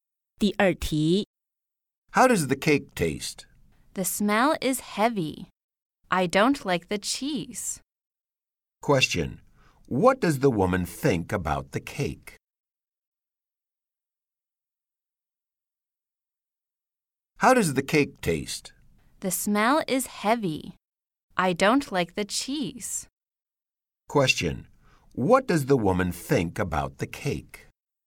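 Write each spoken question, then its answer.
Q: What does the woman think about the cake?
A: She doesn't like it; the cheese smell is too heavy.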